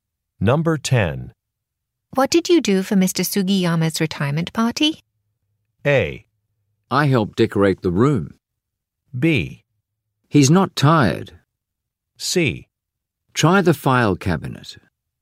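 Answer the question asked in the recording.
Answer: A: I helped decorate the room.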